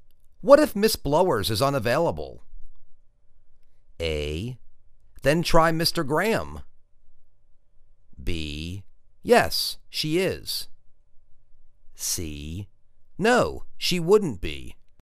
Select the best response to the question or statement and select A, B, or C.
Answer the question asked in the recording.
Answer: Then try Mr. Graham.